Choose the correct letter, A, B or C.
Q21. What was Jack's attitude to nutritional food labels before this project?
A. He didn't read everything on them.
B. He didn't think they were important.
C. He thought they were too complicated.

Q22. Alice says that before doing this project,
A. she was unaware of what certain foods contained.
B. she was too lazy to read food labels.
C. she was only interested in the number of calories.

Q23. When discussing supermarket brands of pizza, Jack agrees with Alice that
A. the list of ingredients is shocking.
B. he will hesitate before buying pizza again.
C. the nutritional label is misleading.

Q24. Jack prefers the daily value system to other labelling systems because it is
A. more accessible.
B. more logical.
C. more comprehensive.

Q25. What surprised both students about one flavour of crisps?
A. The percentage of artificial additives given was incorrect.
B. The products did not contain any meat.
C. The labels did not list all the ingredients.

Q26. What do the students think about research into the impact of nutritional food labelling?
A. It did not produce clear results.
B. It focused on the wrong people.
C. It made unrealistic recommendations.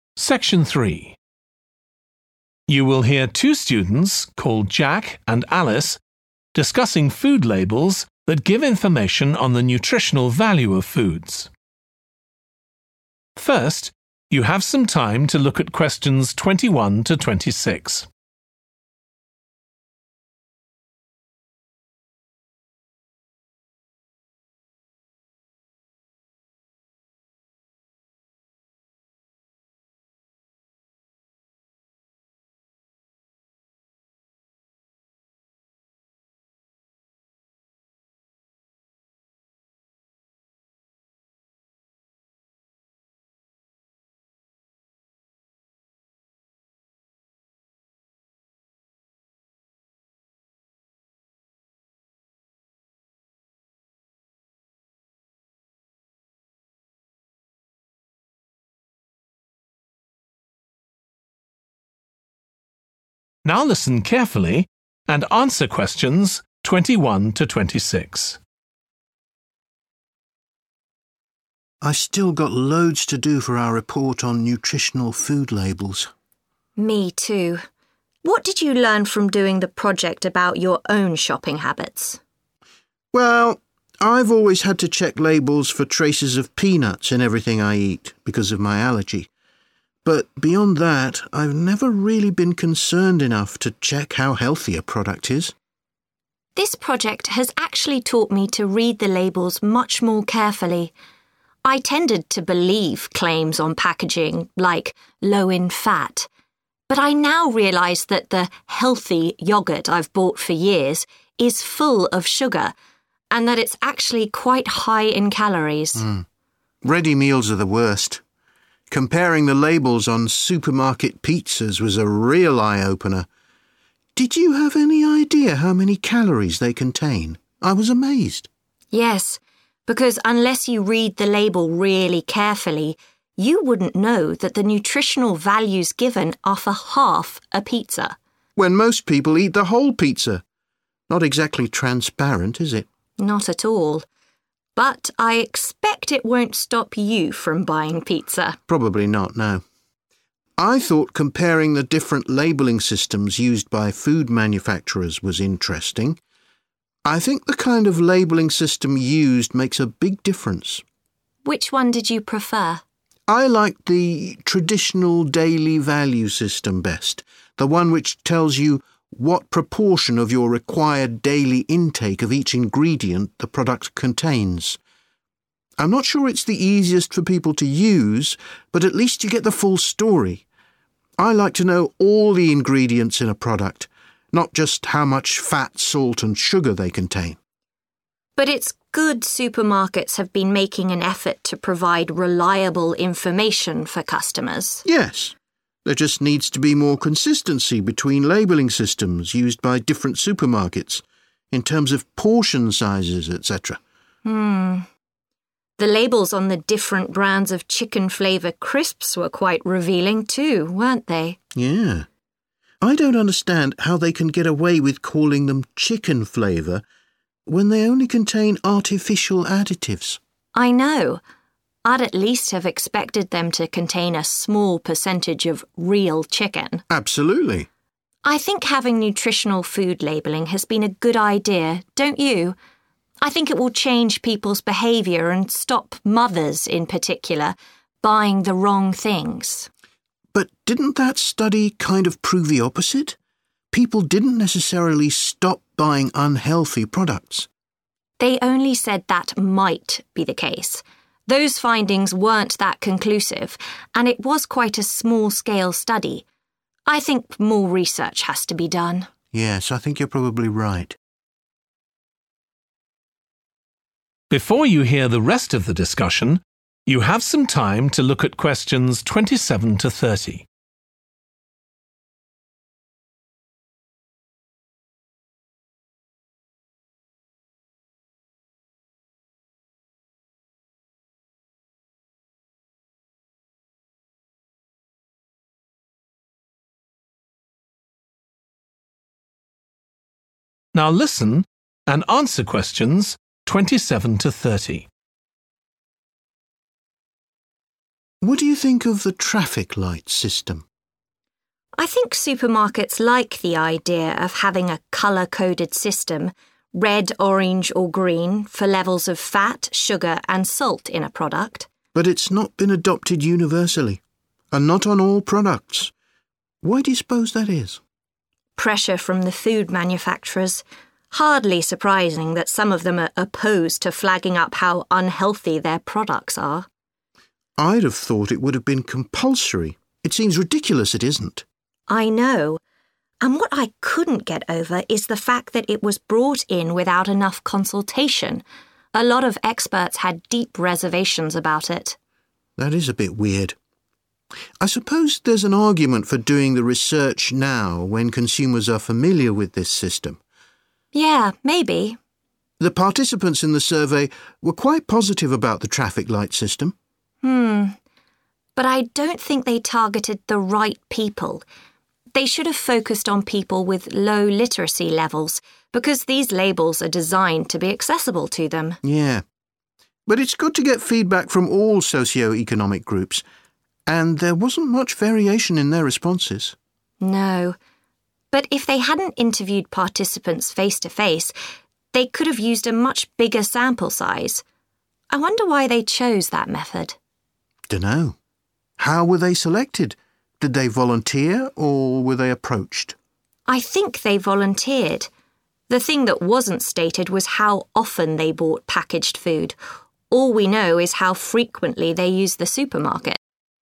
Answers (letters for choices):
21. A
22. A
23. C
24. C
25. B
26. A

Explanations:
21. I've never really been concerned enough to check how healthy a product is. Excerpt/Transcript Explanation: The transcript shows that Jack did not worry or care enough to look at how healthy a product is. Answer Explanation: The answer suggests that Jack did not read everything on the nutritional food labels. Reason For Correctness: The correct answer is 'A' because Jack's statement of not being concerned about checking how healthy a product is aligns with the interpretation that he didn't read everything on the food labels. This shows his attitude of not paying much attention to the nutritional information provided on the packaging.
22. The transcript is saying that Alice used to trust labels on food packaging that claimed the food was 'healthy' or 'low in fat'. However, after reading the nutritional information, she realized that the yogurt she thought was healthy actually contained a lot of sugar and was high in calories. Answer Explanation: The answer suggests that Alice was unaware of the actual contents of certain foods before starting the project. Reason For Correctness: The correct answer is 'A' because in the excerpt, Alice mentions that she used to believe the claims on food packaging without really knowing what certain foods contained. This shows that before starting the project, she was indeed unaware of the actual nutritional content of the foods she was consuming.
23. The transcript is saying that unless you look closely at the label, you might not realize that the nutritional information is only for half a pizza, not the whole pizza. Answer Explanation: The answer means that Jack will hesitate before buying pizza again because he might be concerned about the nutritional information being unclear. Reason For Correctness: The correct answer is C because the conversation suggests that Jack will be more cautious about buying pizza in the future due to realizing that the nutritional label could be misleading since it only represents half a pizza's value.
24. I'm not sure it's the easiest for people to use but at least you get the full story. Excerpt/Transcript Explanation: The transcript suggests that the daily value system may not be the easiest for people to use, but it provides all the necessary information. Answer Explanation: The answer indicates that Jack prefers the daily value system because it gives a full and complete picture of the nutritional information. Reason For Correctness: The correct answer, 'C - more comprehensive,' is supported by the excerpt because even though the daily value system may not be the easiest to use, it does provide detailed and extensive nutritional information, making it more comprehensive than other labeling systems.
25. The transcript shows that the speaker is surprised that crisps labeled as chicken flavor only contain artificial additives. Answer Explanation: The answer suggests that what surprised the students about one flavor of crisps was the fact that the products did not contain any meat. Reason For Correctness: The correct answer is 'B' because the speaker mentions that the crisps are called chicken flavor but only contain artificial additives, indicating that they did not contain any meat as expected. This aligns with answer choice 'B' about the products not containing any meat.
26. Those findings weren't that conclusive Excerpt/Transcript Explanation: The transcript is saying that the results of the research were not very clear or definite. Answer Explanation: The answer indicates that the students did not think the research produced clear results. Reason For Correctness: The correct answer is 'A' because it aligns with the transcript excerpt stating that the findings weren't conclusive, meaning they were not definitive or clear.

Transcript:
JACK: I've still got loads to do for our report on nutritional food labels.
ALICE: Me too. What did you learn from doing the project about your own shopping habits?
JACK: Well, I've always had to check labels for traces of peanuts in everything I eat because of my allergy. But beyond that I've never really been concerned enough to check how healthy a product is.
ALICE: This project has actually taught me to read the labels much more carefully. I tended to believe claims on packaging like 'low in fat'. But I now realise that the 'healthy' yoghurt I've bought for years is full of sugar and that it's actually quite high in calories.
JACK: Ready meals are the worst ... comparing the labels on supermarket pizzas was a real eye-opener. Did you have any idea how many calories they contain? I was amazed.
ALICE: Yes, because unless you read the label really carefully, you wouldn't know that the nutritional values given are for half a pizza.
JACK: When most people eat the whole pizza. Not exactly transparent is it?
ALICE: Not at all. But I expect it won't stop you from buying pizza?
JACK: Probably not, no! I thought comparing the different labelling systems used by food manufactures was interesting. I think the kind of labelling system used makes a big difference.
ALICE: Which one did you prefer?
JACK: I liked the traditional daily value system best – the one which tells you what proportion of your required daily intake of each ingredient the product contains. I'm not sure it's the easiest for people to use but at least you get the full story. I like to know all the ingredients in a product – not just how much fat, salt and sugar they contain.
ALICE: But it's good supermarkets have been making an effort to provide reliable information for customers.
JACK: Yes. There just needs to be more consistency between labelling systems used by different supermarkets, in terms of portion sizes, etc.
The labels on the different brands of chicken flavour crisps were quite revealing too, weren't they?
JACK: Yeah. I don't understand how they can get away with calling them chicken flavour when they only contain artificial additives.
ALICE: I know. I'd at least have expected them to contain a small percentage of real chicken.
JACK: Absolutely.
ALICE: I think having nutritional food labeling has been a good idea, don't you? I think it will change people's behaviour and stop mothers, in particular, buying the wrong things.
JACK: But didn't that study kind of prove the opposite? People didn't necessarily stop buying unhealthy products.
ALICE: They only said that might be the case. Those findings weren't that conclusive and it was quite a small-scale study. I think more research has to be done.
JACK: Yes, I think you're probably right.
JACK: What do you think of the traffic-light system?
ALICE: I think supermarkets like the idea of having a colour-coded system – red, orange or green – for levels of fat, sugar and salt in a product.
JACK: Buy it's not been adopted universally. And not on all products. Why do you suppose that is?
ALICE: Pressure from the food manufacturers. Hardly surprising that some of them are opposed to flagging up how unhealthy their products are.
JACK: I'd have thought it would have been compulsory. It seems ridiculous it isn't.
ALICE: I know. And what I couldn't get over is the fact that it was brought in without enough consultation – a lot of experts had deep reservations about it.
JACK: That is a bit weird. I suppose there's an argument for doing the research now when consumers are familiar with this system.
ALICE: Yeah, maybe.
JACK: The participants in the survey were quite positive about the traffic-light system.
But I don't think they targeted the right people. They should have focused on people with low literacy levels because these labels are designed to be accessible to them.
JACK: Yeah. But it's good to get feedback from all socio-economic groups. And there wasn't much variation in their responses.
ALICE: No. But if they hadn't interviewed participants face-to-face, they could have used a much bigger sample size. I wonder why they chose that method?
JACK: Dunno. How were they selected? Did they volunteer or were they approached?
ALICE: I think they volunteered. The thing that wasn't stated was how often they bought packaged food – all we know is how frequently they used the supermarket.